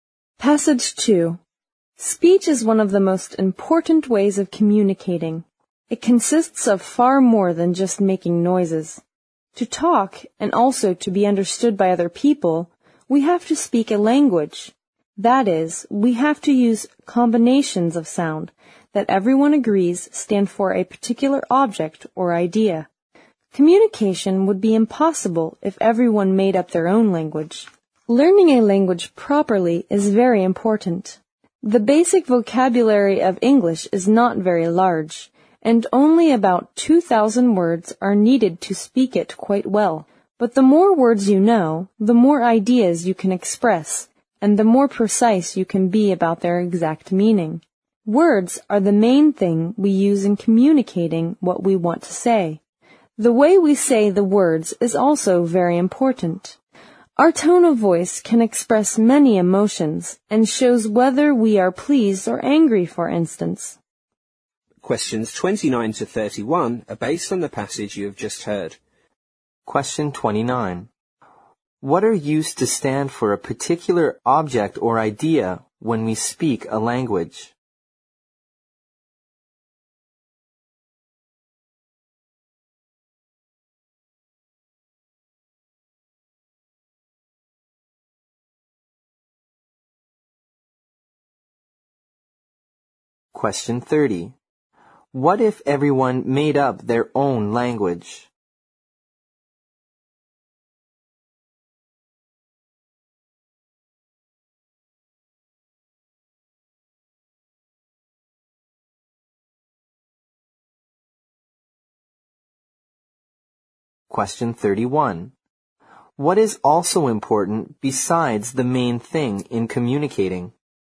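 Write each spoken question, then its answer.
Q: What are used to stand for a particular object or idea when we speak a language?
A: Combinations of sounds

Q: What if everyone made up their own language?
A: Communication would be impossible

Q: What is also important besides the main thing in communicating?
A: The way we say the words (tone of voice)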